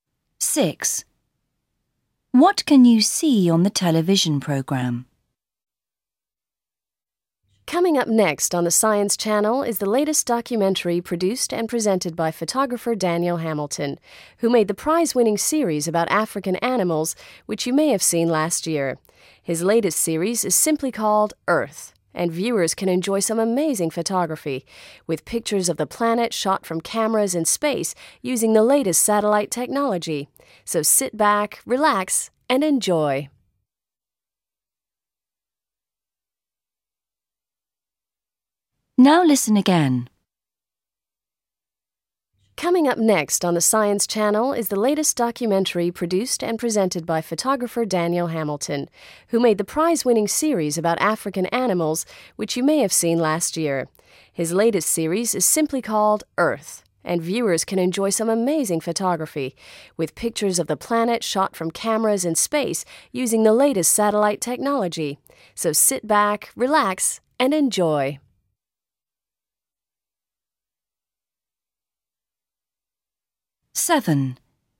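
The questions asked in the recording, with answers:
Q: What can you see on the television programme?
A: pictures of the Earth taken from space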